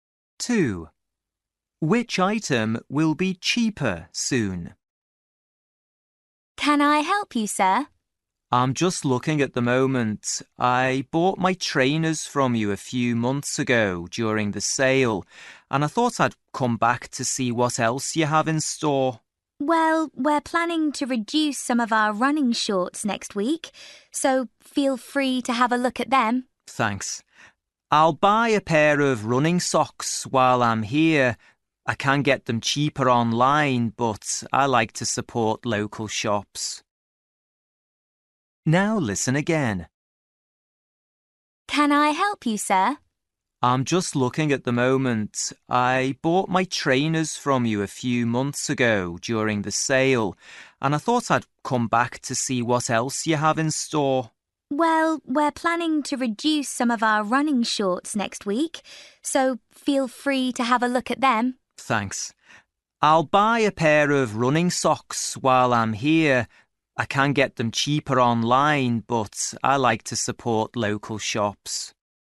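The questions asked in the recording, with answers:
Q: Which item will be cheaper soon?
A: running shorts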